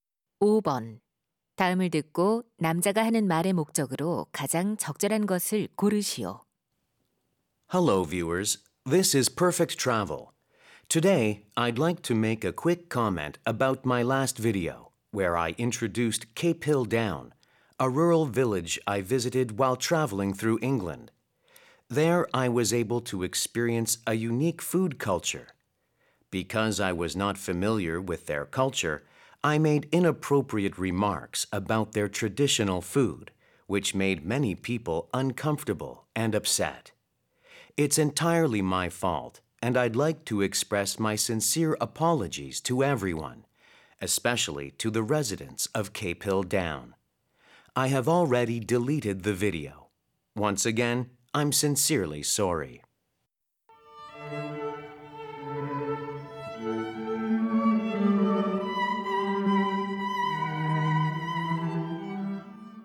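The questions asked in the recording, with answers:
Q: 다음을 듣고 남자가 하는 말의 목적으로 가장 적절한 것을 고르시오.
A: 지난 영상의 부적절한 발언에 대해 사과하려고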